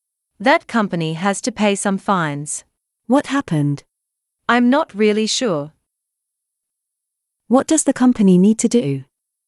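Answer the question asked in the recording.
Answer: pay some fines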